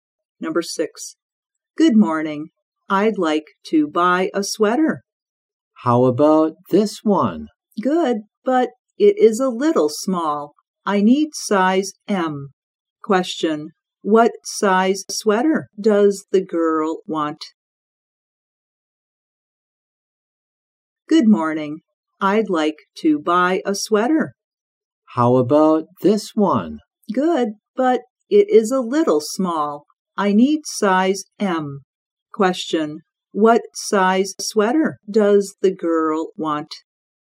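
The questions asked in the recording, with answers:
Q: what size sweater does the girl want?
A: Size M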